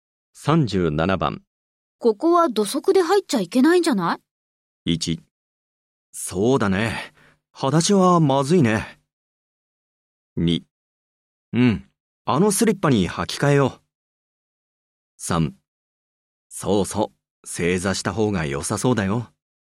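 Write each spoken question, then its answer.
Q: ここは土足で入っちゃいけないんじゃない?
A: 2: うん。あのスリッパに履き替えよう。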